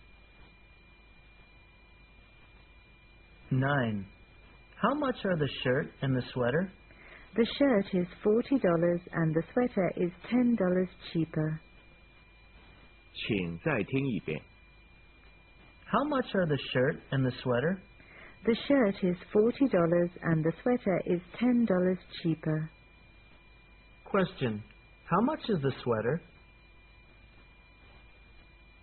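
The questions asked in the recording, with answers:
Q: How much is the sweater?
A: $30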